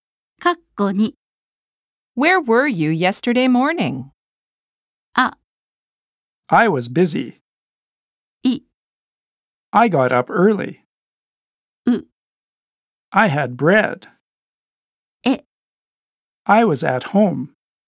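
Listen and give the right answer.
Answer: E: I was at home.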